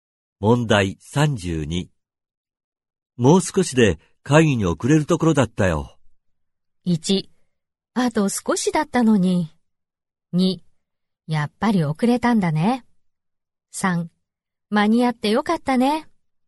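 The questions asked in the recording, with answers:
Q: もう少しで会議に遅れるところだったよ。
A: 3: 間に合ってよかったね。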